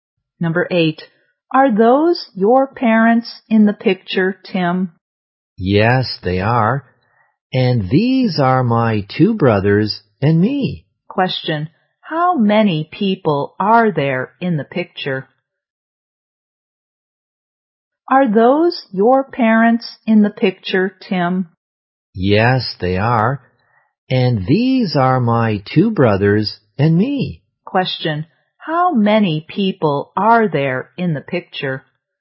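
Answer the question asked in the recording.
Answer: Five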